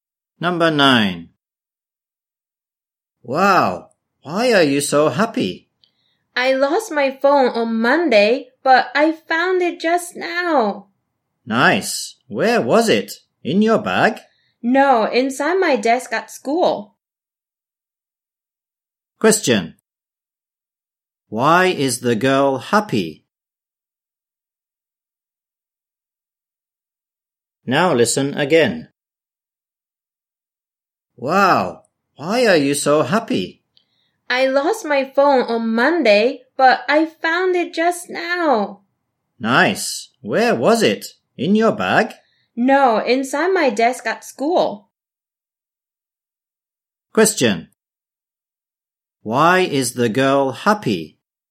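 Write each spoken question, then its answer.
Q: Why is the girl happy?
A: She found her lost phone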